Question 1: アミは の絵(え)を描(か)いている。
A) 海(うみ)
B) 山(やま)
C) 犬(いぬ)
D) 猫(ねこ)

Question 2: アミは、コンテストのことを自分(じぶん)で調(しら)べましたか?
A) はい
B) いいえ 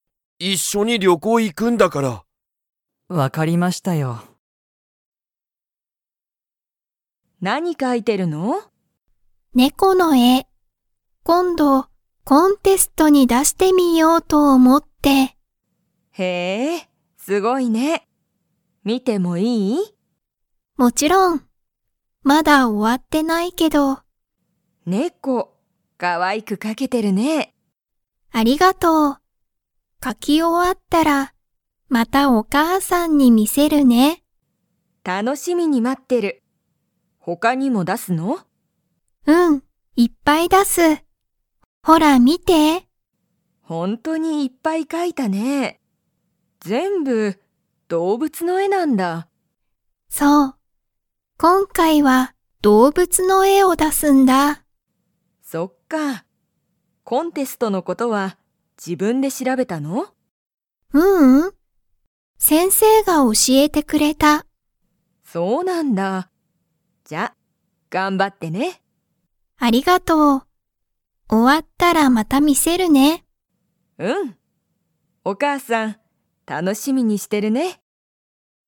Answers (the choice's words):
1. 猫(ねこ)
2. いいえ

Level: Level 3